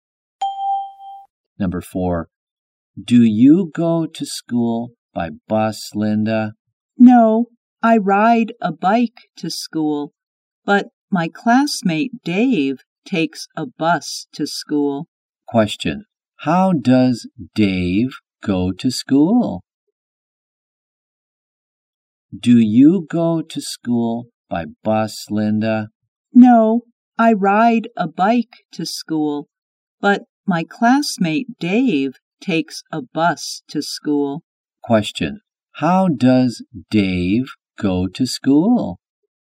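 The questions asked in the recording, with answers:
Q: How does Dave go to school?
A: He takes a bus.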